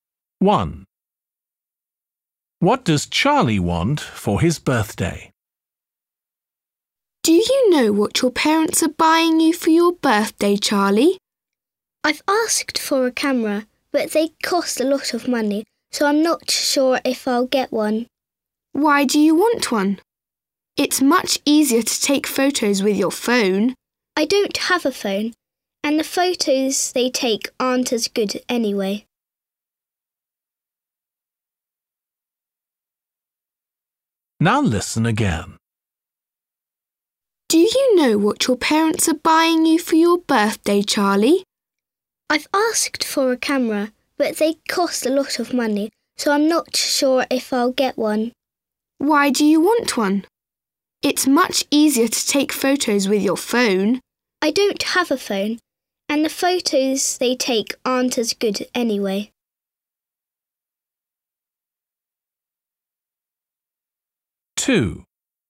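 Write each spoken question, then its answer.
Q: What does Charlie want for his birthday?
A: a camera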